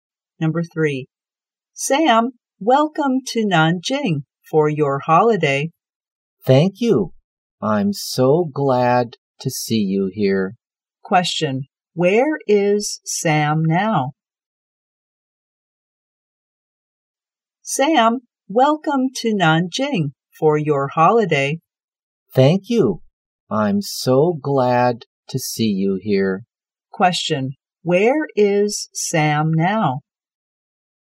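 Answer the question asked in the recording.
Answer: In Nanjing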